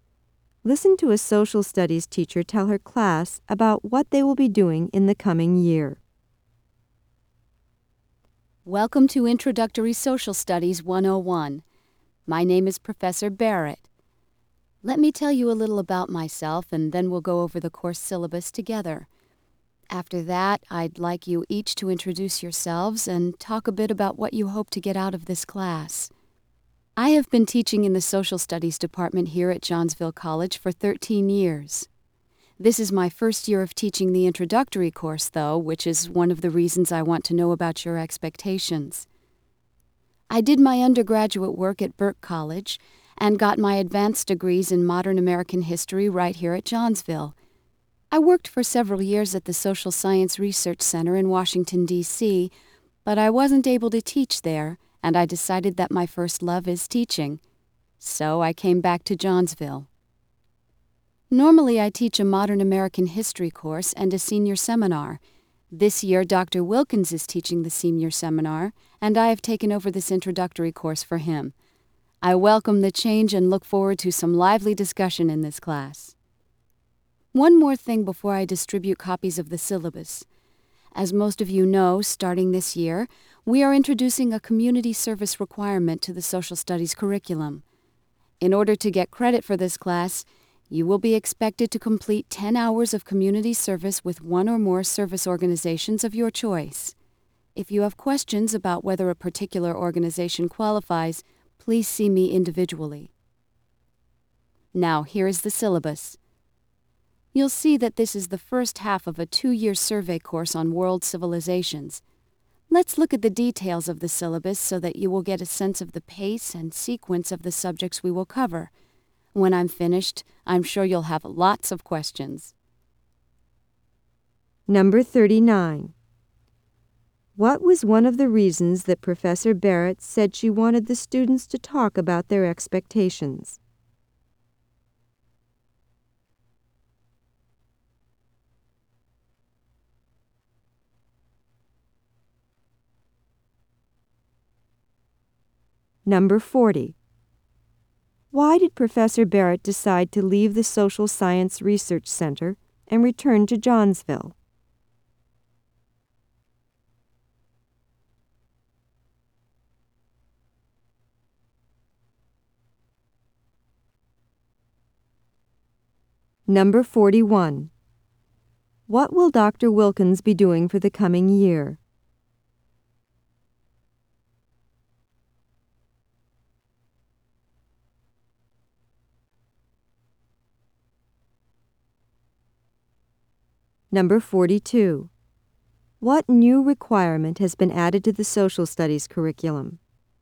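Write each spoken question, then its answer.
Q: What was one of the reasons that Professor Barrett said she wanted the students to talk about their expectations?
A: It is her first year teaching the introductory course

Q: Why did Professor Barrett decide to leave the Social Science Research Center and return to Johnsville?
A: She wasn't able to teach there; her first love is teaching

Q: What will Dr. Wilkins be doing for the coming year?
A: Teaching the senior seminar

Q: What new requirement has been added to the social studies curriculum?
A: 10 hours of community service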